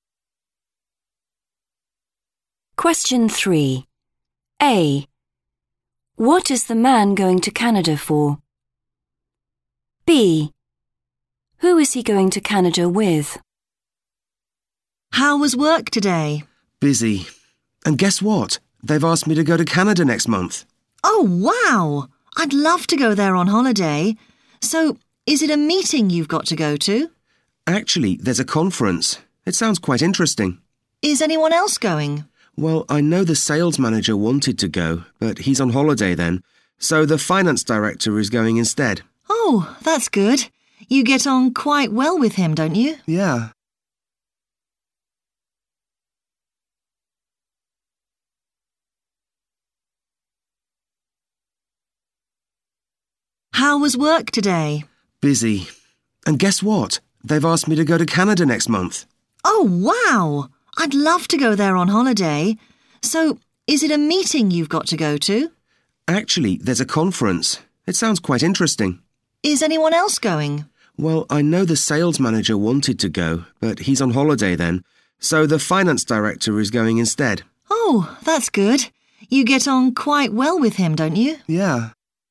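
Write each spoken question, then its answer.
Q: What is the man going to Canada for?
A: a conference

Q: Who is he going to Canada with?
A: the finance director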